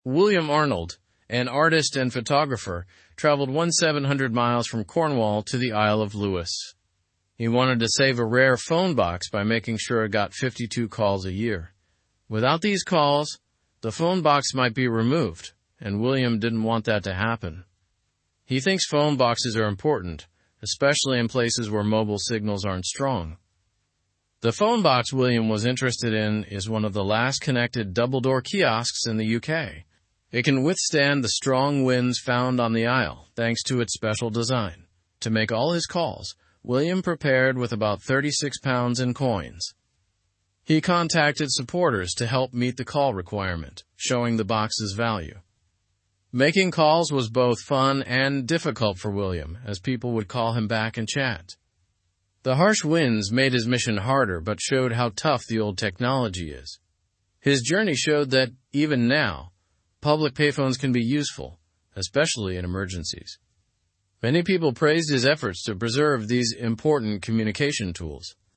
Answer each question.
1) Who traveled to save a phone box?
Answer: William Arnold.

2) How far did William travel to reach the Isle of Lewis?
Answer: 1,700 miles.

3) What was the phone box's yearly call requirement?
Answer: 52 calls.

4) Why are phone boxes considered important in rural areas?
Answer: Because mobile signals can be weak.

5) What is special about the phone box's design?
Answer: It is adapted to withstand strong winds.

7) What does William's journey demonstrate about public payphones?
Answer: They still have relevance and can be vital in emergencies.

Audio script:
William Arnold, an artist and photographer, traveled 1,700 miles from Cornwall to the Isle of Lewis. He wanted to save a rare phone box by making sure it got 52 calls a year. Without these calls, the phone box might be removed, and William didn't want that to happen. He thinks phone boxes are important, especially in places where mobile signals aren't strong.
The phone box William was interested in is one of the last connected double-door kiosks in the UK. It can withstand the strong winds found on the Isle, thanks to its special design. To make all his calls, William prepared with about £36 in coins. He contacted supporters to help meet the call requirement, showing the box's value.
Making calls was both fun and difficult for William, as people would call him back and chat. The harsh winds made his mission harder but showed how tough the old technology is. His journey showed that even now, public payphones can be useful, especially in emergencies.

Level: (Level 2)